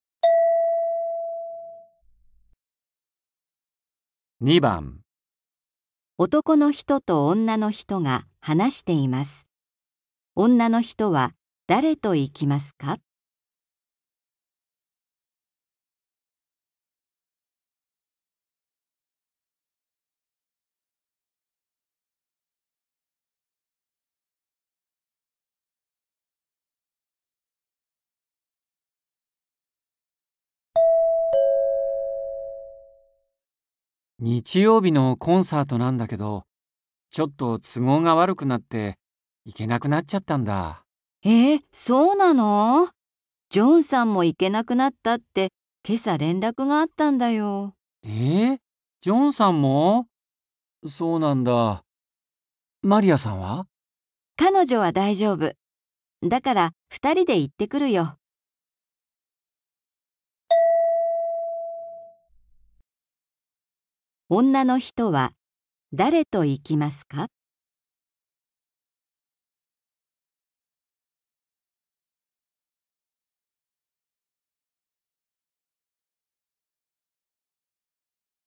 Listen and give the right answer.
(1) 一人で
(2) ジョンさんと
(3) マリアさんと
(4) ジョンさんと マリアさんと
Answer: (3) マリアさんと

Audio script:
M:日曜日のコンサートなんだけど、ちょっと都合が悪くなって、行けなくなっちゃったんだ。
F:えっ、そうなの!? ジョンさんも行けなくなったって、今朝、連絡があったんだよ。

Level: 初級